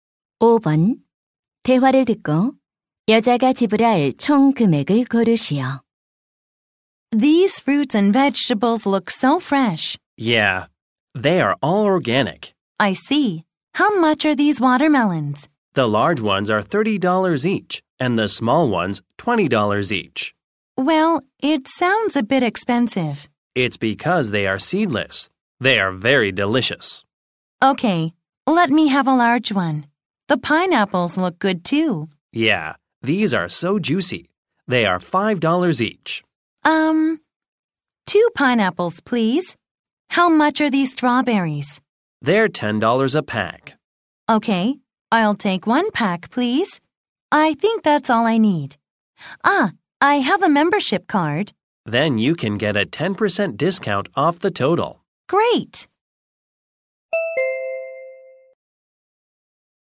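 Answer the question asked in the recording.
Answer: 45달러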